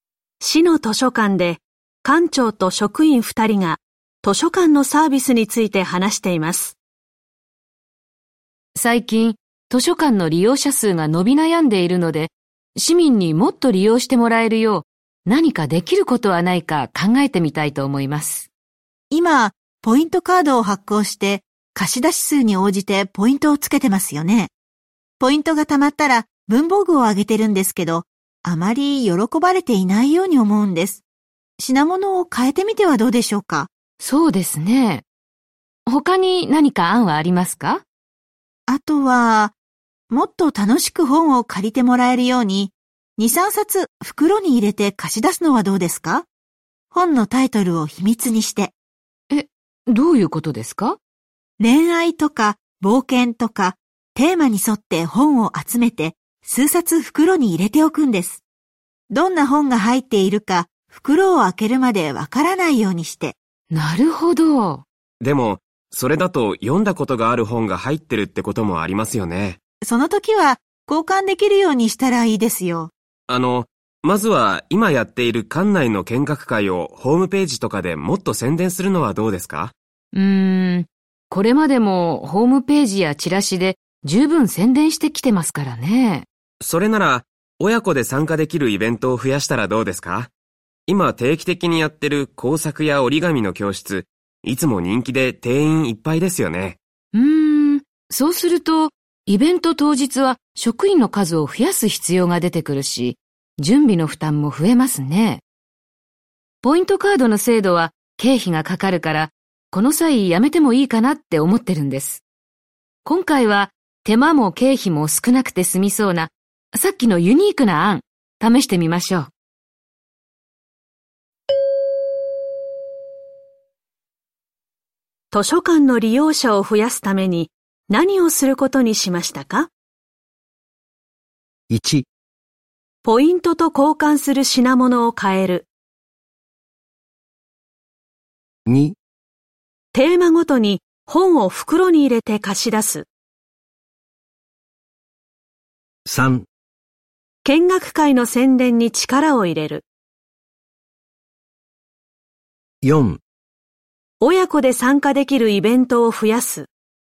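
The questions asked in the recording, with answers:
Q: 図書館の利用者を増やすために、何をすることにしましたか?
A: 2: テーマごとに本を袋に入れて貸し出す。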